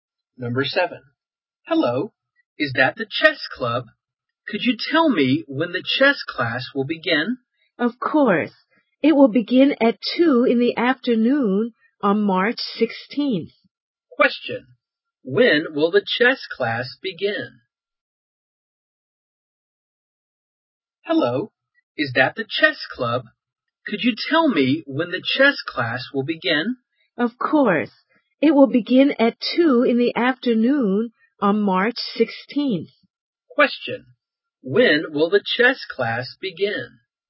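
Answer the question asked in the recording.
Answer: At 2 in the afternoon on March 16th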